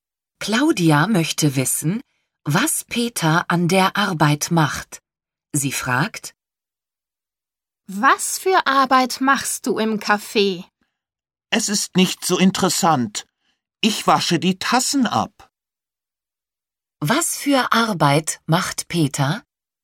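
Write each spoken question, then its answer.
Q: Was für Arbeit macht Peter?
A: Er wäscht die Tassen ab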